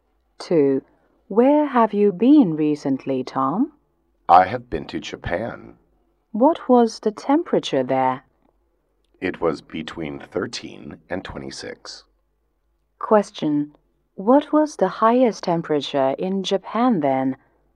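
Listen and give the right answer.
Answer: 26 degrees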